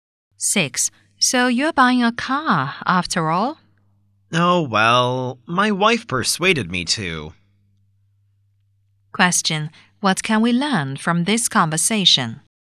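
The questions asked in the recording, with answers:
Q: What can we learn from this conversation?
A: The man is buying a car because his wife persuaded him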